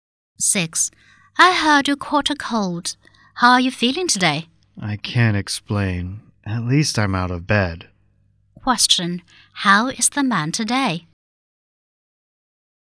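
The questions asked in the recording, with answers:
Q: How is the man today?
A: A little better; he is out of bed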